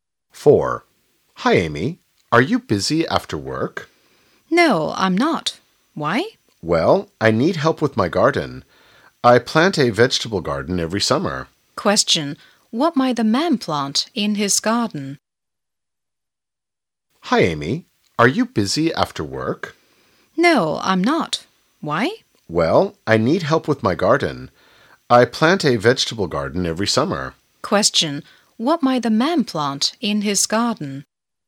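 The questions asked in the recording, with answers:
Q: Question, what might the man plant in his garden?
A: Vegetables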